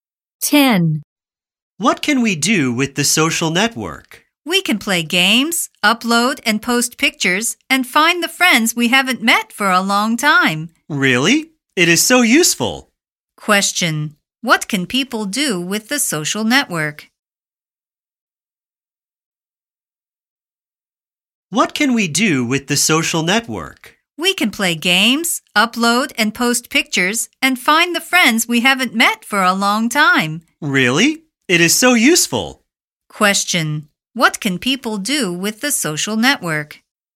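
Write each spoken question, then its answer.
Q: What can people do with the social network?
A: Play games, upload and post pictures, and find old friends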